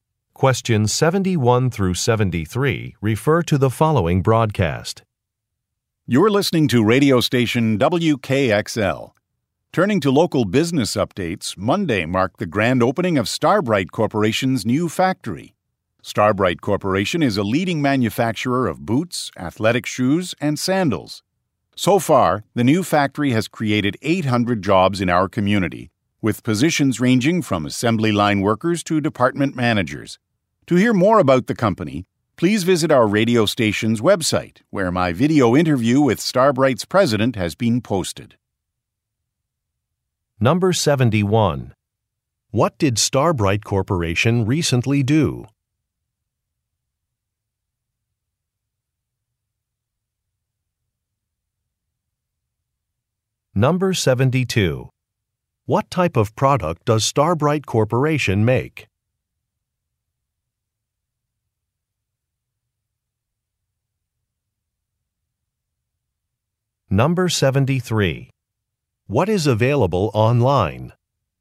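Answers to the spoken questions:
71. Opened a new factory
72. Footwear (boots, athletic shoes, and sandals)
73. A video interview with Starbright's president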